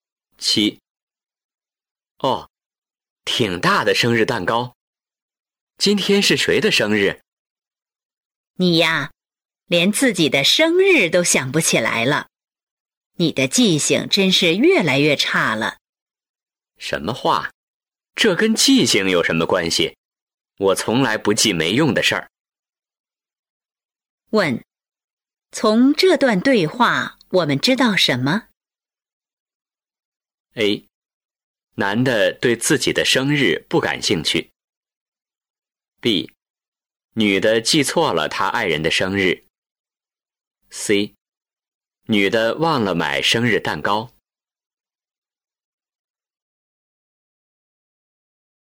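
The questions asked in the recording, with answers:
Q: 问,从这段对话我们知道什么?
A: A: 男的对自己的生日不感兴趣。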